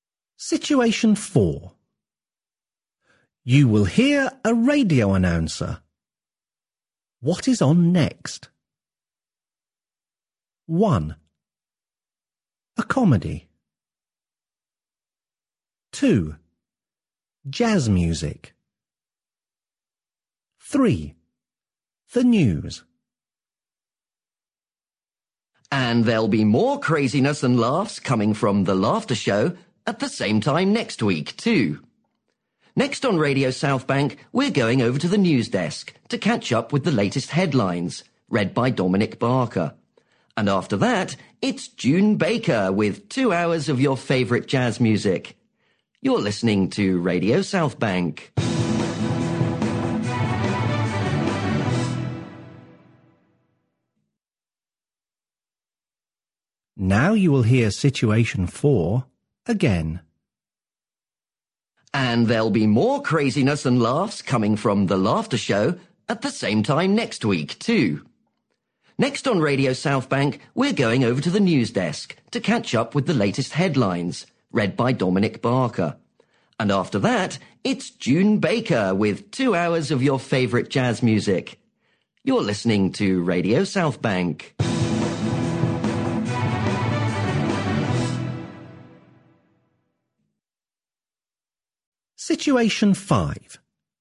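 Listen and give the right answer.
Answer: 3: The news.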